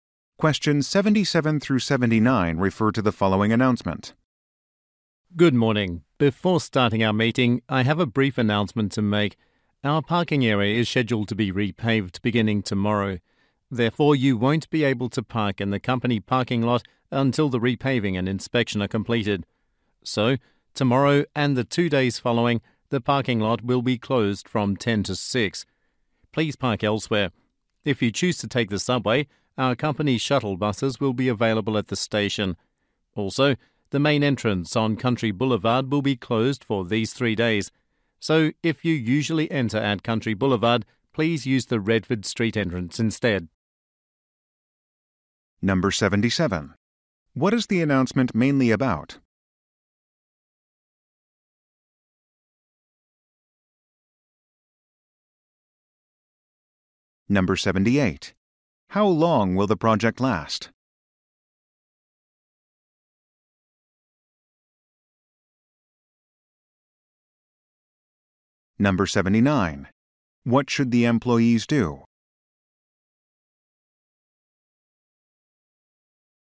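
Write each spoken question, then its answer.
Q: What is the announcement mainly about?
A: Repaving of the parking area

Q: How long will the project last?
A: Three days

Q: What should the employees do?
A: Park elsewhere and use the Redford Street entrance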